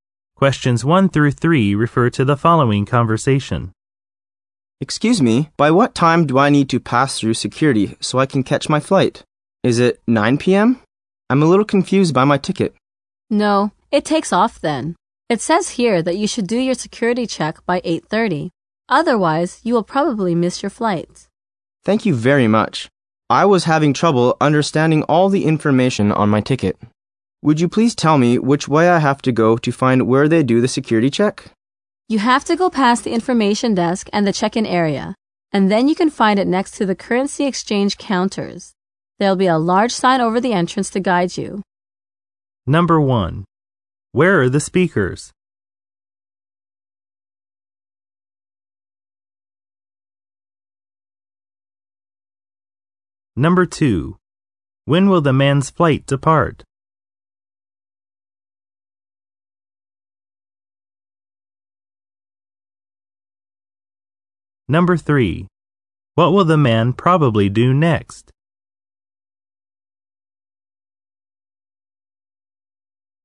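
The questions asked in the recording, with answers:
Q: Where are the speakers?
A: At an airport

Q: When will the man's flight depart?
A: At 9 p.m.

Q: What will the man probably do next?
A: Go to the security check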